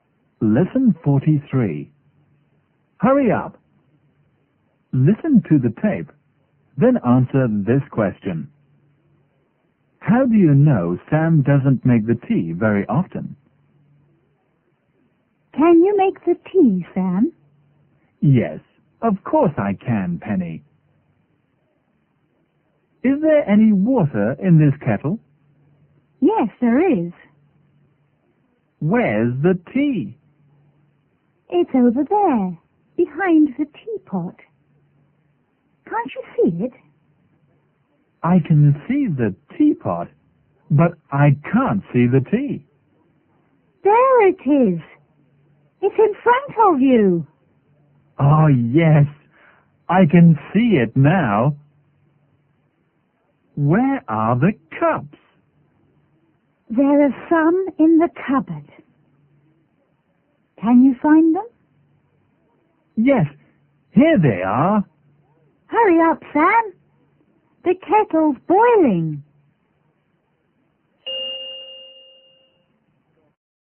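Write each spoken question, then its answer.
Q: How do you know Sam doesn't make the tea very often?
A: He can't find the tea or the cups; Penny has to tell him where they are.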